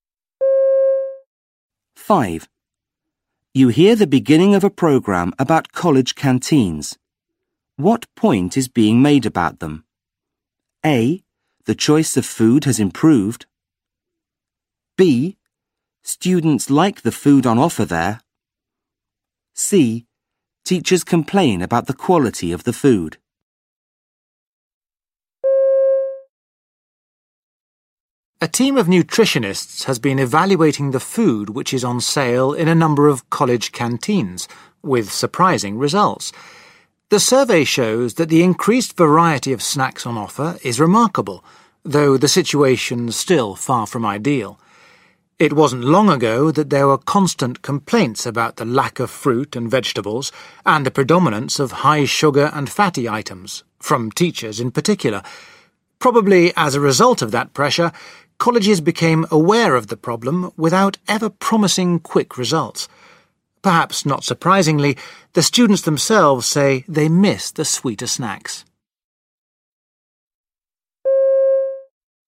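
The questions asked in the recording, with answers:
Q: What point is being made about them?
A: A: The choice of food has improved.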